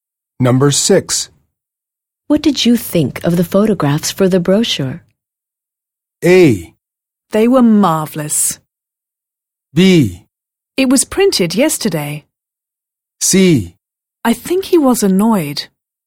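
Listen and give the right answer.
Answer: A: They were marvelous.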